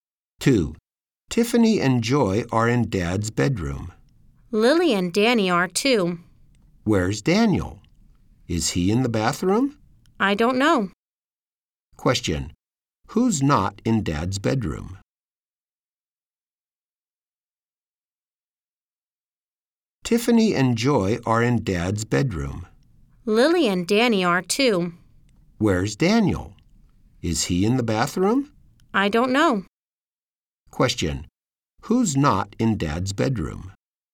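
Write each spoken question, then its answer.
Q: Who's not in Dad's bedroom?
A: Daniel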